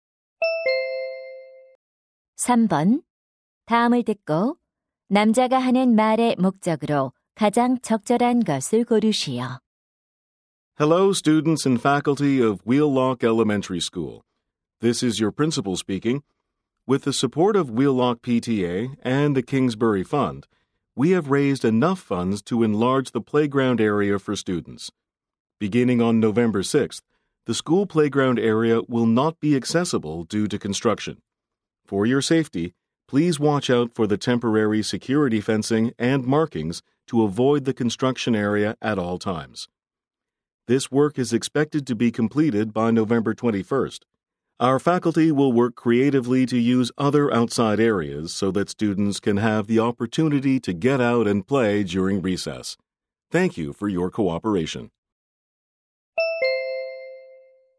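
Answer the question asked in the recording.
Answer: 공사로 인한 운동장 사용 제한을 알리려고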